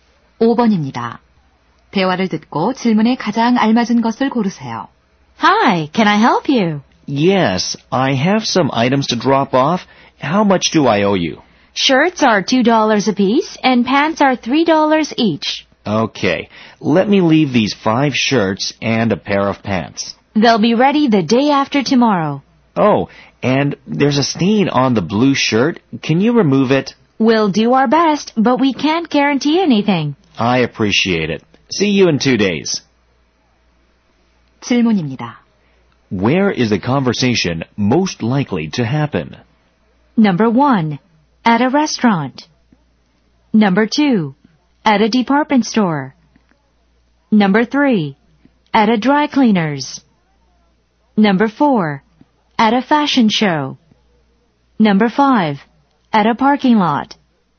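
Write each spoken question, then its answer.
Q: Where is the conversation most likely to happen?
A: 3: At a dry cleaner's.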